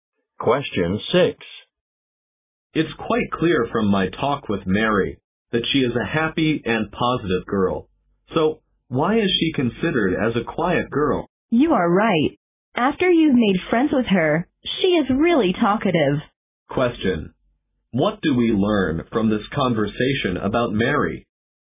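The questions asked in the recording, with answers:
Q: What do we learn from this conversation about Mary?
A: She is talkative once you become her friend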